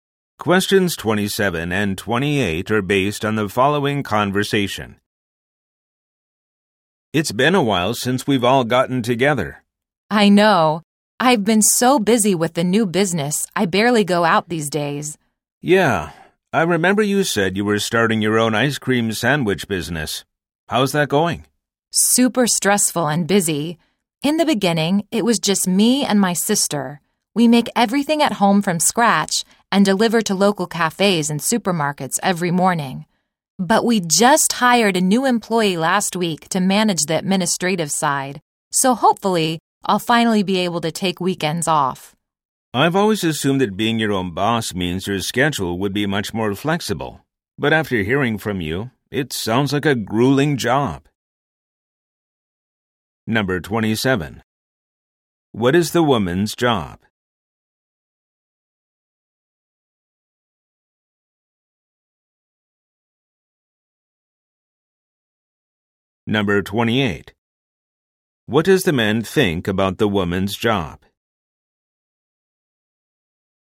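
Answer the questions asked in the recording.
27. She runs her own ice cream sandwich business
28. It sounds grueling, not as flexible as he assumed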